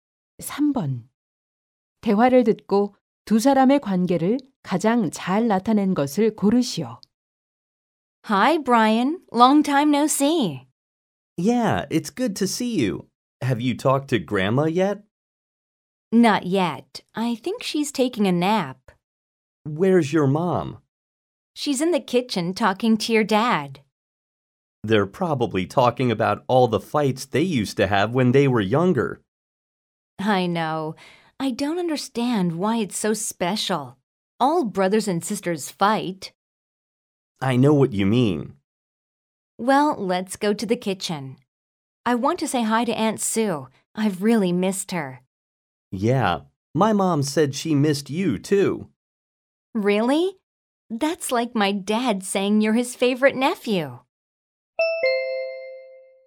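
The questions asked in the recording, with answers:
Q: 대화를 듣고 두 사람의 관계를 가장 잘 나타낸 것을 고르시오.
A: 사촌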